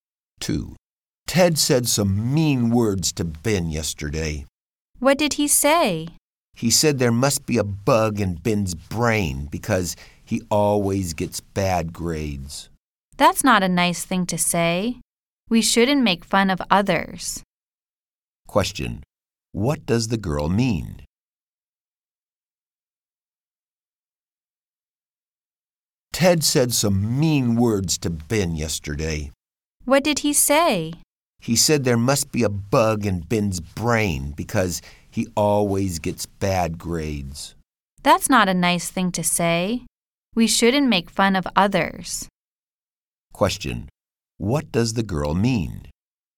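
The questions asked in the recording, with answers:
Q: What does the girl mean?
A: We shouldn't make fun of others.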